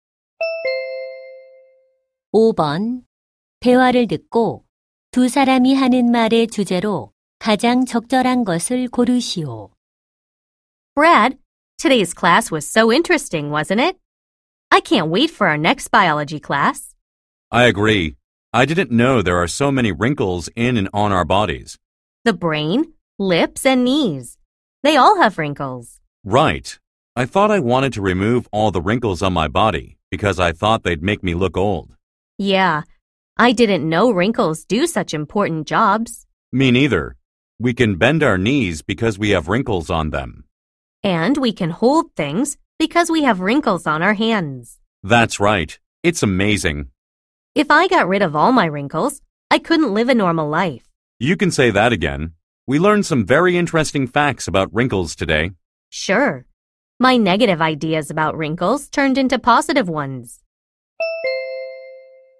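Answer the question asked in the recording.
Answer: 신체 주름의 중요한 역할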